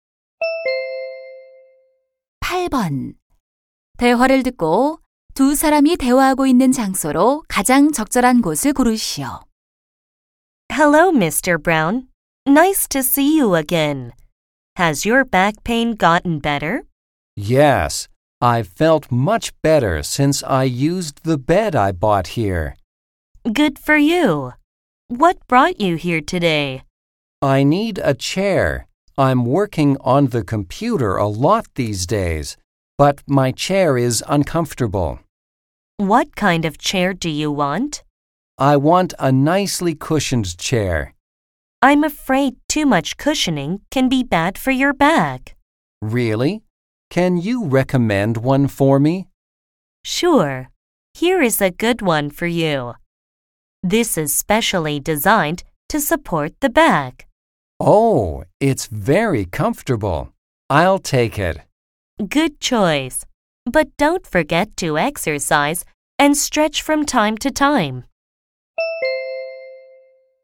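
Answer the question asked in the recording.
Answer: 가구점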